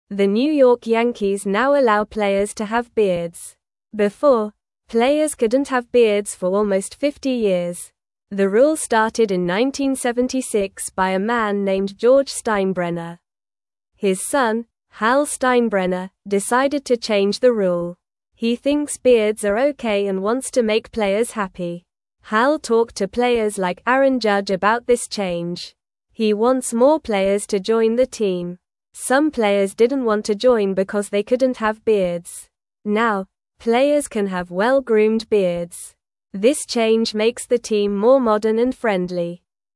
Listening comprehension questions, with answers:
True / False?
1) Hal thinks beards are okay for players.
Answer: True

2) Hal Steinbrenner is George Steinbrenner's grandson.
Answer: False

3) Some players wanted to join the team but did not like the beard rule.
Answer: True

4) George Steinbrenner made the rule about beards.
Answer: True

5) Now, players can have messy and unkempt beards.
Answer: False

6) The New York Yankees let players have beards now.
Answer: True

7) The rule about beards started in 1967.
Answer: False

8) Before, players could have beards for almost 30 years.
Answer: False

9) The New York Yankees now allow players to (1)______ beards.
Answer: have

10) Before, players couldn't have beards for almost 50 (2)______.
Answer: years

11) The rule started in 1976 by a man (3)______ George Steinbrenner.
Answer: named

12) He thinks beards are (4)______ and wants to make players happy.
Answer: okay

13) Hal talked to (5)______ like (6)______ Judge about this change.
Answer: players

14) Hal talked to (5)______ like (6)______ Judge about this change.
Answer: Aaron

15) This change (7)______ the (8)______ more modern and friendly.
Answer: makes

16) This change (7)______ the (8)______ more modern and friendly.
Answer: team

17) What did the Yankees change about players?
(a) They can wear hats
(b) They can wear gloves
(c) They can change their names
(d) They can have beards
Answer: (d) They can have beards

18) How long could players not have beards?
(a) Almost 50 years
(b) 10 years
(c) 20 years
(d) 30 years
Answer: (a) Almost 50 years

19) Who started the rule about beards?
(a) Hal Steinbrenner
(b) Aaron Judge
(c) George Steinbrenner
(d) A player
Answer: (c) George Steinbrenner

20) Why did Hal Steinbrenner change the rule?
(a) To sell more tickets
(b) To change the team name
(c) To make players happy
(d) To make the team lose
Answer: (c) To make players happy

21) Who did Hal talk to about the beard change?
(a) His father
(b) Aaron Judge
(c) The fans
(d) The coach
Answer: (b) Aaron Judge

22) What kind of beards can players have now?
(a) Long beards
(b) Funny beards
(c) No beards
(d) Well-groomed beards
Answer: (d) Well-groomed beards

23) How does the change make the team feel?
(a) Old and boring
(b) More modern and friendly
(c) Sad and angry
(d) Big and strong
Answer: (b) More modern and friendly

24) Who is the team that now lets players have beards?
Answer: The team is the New York Yankees.

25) How long did players not have beards?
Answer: Players did not have beards for almost 50 years.

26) Who made the rule that said players couldn't have beards?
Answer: A man named George Steinbrenner made the rule.

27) Who changed the rule about beards?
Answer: Hal Steinbrenner changed the rule.

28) Why did Hal want to change the rule?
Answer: Hal wanted to make players happy.

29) Who did Hal talk to about the new beard rule?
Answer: Hal talked to players like Aaron Judge.

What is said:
The New York Yankees now allow players to have beards. Before, players couldn't have beards for almost 50 years. The rule started in 1976 by a man named George Steinbrenner. His son, Hal Steinbrenner, decided to change the rule. He thinks beards are okay and wants to make players happy.
Hal talked to players like Aaron Judge about this change. He wants more players to join the team. Some players didn't want to join because they couldn't have beards. Now, players can have well-groomed beards. This change makes the team more modern and friendly.

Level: Level 1

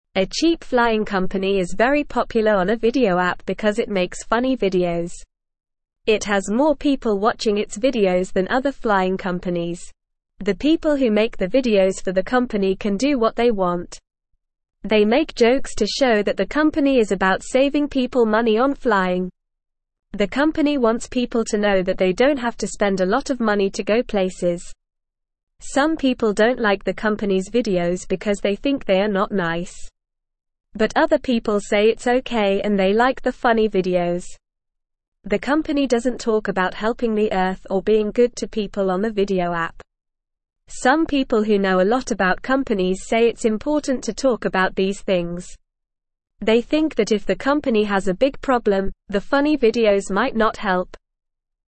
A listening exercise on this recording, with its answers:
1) Why is the cheap flying company popular on the video app?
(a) Because it makes funny videos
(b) Because it has a lot of money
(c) Because it flies to many countries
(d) Because it has a big building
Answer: (a) Because it makes funny videos

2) What do the people who make the videos for the company do?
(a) They have to follow strict rules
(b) They have to wear special clothes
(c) They have to be quiet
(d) They can do what they want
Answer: (d) They can do what they want

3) What do the videos show about the company?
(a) That it saves people money on flying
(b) That it has the most expensive flights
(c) That it only flies to one place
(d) That it is a dangerous company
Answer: (a) That it saves people money on flying

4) Why do some people not like the company's videos?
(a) Because they are too long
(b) Because they are too serious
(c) Because they think they are not nice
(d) Because they are too expensive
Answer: (c) Because they think they are not nice

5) What do some people think the company should talk about on the video app?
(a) Making more funny videos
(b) Talking about other companies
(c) Talking about their favorite food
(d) Helping the Earth and being good to people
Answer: (d) Helping the Earth and being good to people

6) What do some people think might happen if the company has a big problem?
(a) The funny videos might make it worse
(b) The funny videos might make people happy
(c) The funny videos might not help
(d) The funny videos might make people laugh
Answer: (c) The funny videos might not help

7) Who thinks it's important for the company to talk about helping the Earth and being good to people?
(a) Some people who don't know anything about companies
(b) Some people who know a lot about companies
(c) Some people who like funny videos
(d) Some people who don't like funny videos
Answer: (b) Some people who know a lot about companies

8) What does the company want people to know?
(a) That they have to spend a lot of money to go places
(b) That they don't have to spend a lot of money to go places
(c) That they can't go places at all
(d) That they have to watch the videos to go places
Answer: (b) That they don't have to spend a lot of money to go places

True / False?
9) Some people don't like the videos because they think they are mean.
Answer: True

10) Other people think the videos are not okay and they dislike them because they are funny.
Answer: False

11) The videos make serious statements to show that the company helps people save money on flying.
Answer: False

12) Some people think it's unimportant for the company to talk about these things, in case they have a big problem.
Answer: False

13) The company doesn't talk about helping the Earth or being nice to people in the videos.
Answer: True

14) The people who make the videos can do whatever they want.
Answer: True

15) Few people watch the videos made by this flying company.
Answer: False

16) There is a flying company that makes funny videos on a video app.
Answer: True

Listen and Fill in the Gaps:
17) A cheap flying company is very popular on a video app because it (1)______ funny videos.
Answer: makes

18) It has more (2)______ watching its videos than other flying companies.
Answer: people

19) They (3)______ jokes to show that the company is about (4)______ people money on flying.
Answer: make

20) They (3)______ jokes to show that the company is about (4)______ people money on flying.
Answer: saving

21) But other people say it's (5)______ and they like the funny videos.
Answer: okay

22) The company doesn't talk about helping the (6)______ or being good to people on the video app.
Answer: Earth

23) Some people who know a lot about companies say it's important to (7)______ about these things.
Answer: talk

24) They (8)______ that if the company has a big problem, the funny videos might not help.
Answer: think

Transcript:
A cheap flying company is very popular on a video app because it makes funny videos. It has more people watching its videos than other flying companies. The people who make the videos for the company can do what they want. They make jokes to show that the company is about saving people money on flying. The company wants people to know that they don't have to spend a lot of money to go places.
Some people don't like the company's videos because they think they are not nice. But other people say it's okay and they like the funny videos. The company doesn't talk about helping the Earth or being good to people on the video app. Some people who know a lot about companies say it's important to talk about these things. They think that if the company has a big problem, the funny videos might not help.

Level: Level 1

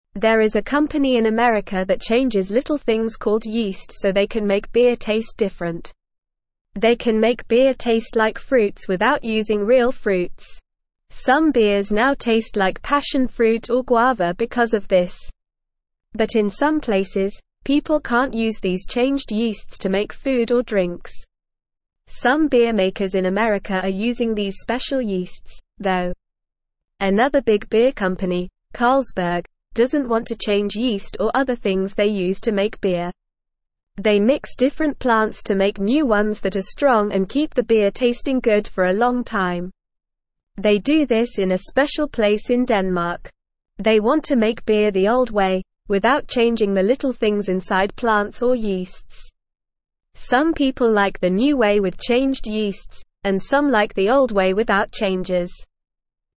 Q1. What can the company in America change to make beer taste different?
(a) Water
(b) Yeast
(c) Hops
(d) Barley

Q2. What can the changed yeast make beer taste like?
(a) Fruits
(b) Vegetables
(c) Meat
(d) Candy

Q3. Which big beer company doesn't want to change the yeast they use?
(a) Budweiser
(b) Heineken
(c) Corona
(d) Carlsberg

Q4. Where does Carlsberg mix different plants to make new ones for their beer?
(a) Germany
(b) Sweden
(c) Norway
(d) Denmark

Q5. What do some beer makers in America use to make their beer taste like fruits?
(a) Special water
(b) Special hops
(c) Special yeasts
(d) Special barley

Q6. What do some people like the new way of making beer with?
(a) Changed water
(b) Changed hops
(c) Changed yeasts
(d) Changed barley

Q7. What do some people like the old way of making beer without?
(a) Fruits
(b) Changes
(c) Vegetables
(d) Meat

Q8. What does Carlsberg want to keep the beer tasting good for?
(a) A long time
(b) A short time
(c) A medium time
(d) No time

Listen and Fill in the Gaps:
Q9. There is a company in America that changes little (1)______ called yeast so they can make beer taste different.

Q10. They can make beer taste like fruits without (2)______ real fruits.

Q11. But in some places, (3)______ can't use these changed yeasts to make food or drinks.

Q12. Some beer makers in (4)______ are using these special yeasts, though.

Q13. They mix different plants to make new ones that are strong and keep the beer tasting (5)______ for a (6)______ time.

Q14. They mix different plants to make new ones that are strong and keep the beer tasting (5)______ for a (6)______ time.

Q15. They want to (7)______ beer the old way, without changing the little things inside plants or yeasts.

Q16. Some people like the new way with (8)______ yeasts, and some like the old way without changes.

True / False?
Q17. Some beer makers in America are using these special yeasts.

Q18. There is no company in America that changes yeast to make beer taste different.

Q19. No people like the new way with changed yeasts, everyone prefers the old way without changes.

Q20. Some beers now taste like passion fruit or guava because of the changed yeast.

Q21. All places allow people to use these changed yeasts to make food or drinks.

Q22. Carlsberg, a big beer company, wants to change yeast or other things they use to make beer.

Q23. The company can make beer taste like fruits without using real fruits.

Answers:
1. (b) Yeast
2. (a) Fruits
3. (d) Carlsberg
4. (d) Denmark
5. (c) Special yeasts
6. (c) Changed yeasts
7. (b) Changes
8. (a) A long time
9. things
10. using
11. people
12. America
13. good
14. long
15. make
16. changed
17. True
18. False
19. False
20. True
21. False
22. False
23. True

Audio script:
There is a company in America that changes little things called yeast so they can make beer taste different. They can make beer taste like fruits without using real fruits. Some beers now taste like passion fruit or guava because of this. But in some places, people can't use these changed yeasts to make food or drinks. Some beer makers in America are using these special yeasts, though.
Another big beer company, Carlsberg, doesn't want to change yeast or other things they use to make beer. They mix different plants to make new ones that are strong and keep the beer tasting good for a long time. They do this in a special place in Denmark. They want to make beer the old way, without changing the little things inside plants or yeasts. Some people like the new way with changed yeasts, and some like the old way without changes.

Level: Level 1

